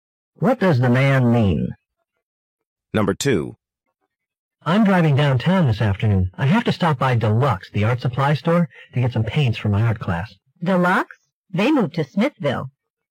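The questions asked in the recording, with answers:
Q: What does the woman mean?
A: Deluxe is no longer downtown; it moved to Smithville.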